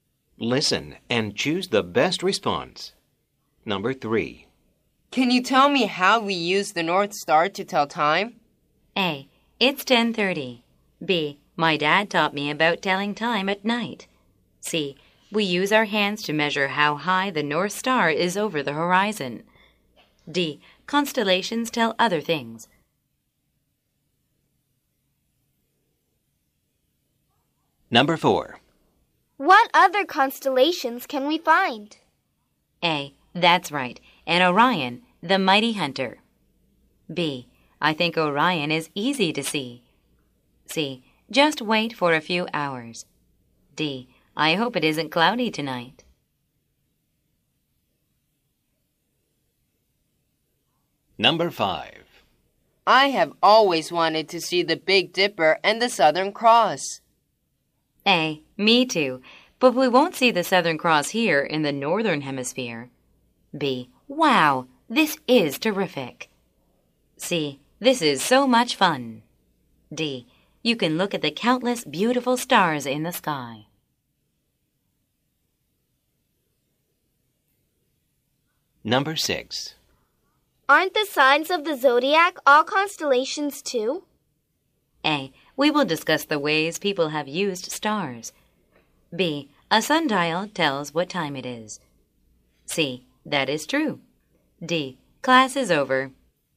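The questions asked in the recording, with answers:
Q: Can you tell me how we use the North Star to tell time?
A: C: We use our hands to measure how high the North Star is over the horizon.

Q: I have always wanted to see the Big Dipper and the Southern Cross.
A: A: Me too, but we won't see the Southern Cross here in the Northern Hemisphere.

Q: Aren't the signs of the zodiac all constellations too?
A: C: That is true.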